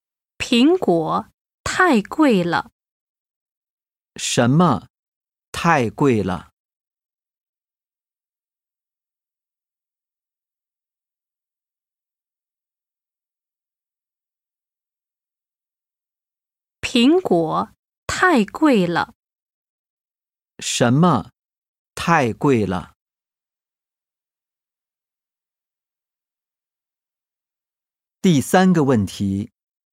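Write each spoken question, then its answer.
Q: 什么太贵了?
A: 苹果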